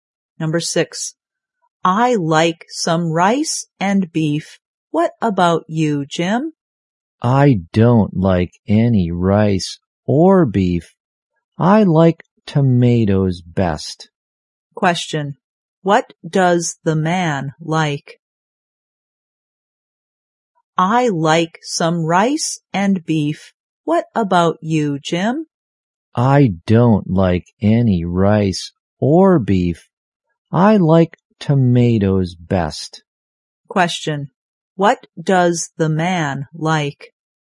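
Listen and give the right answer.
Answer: Tomatoes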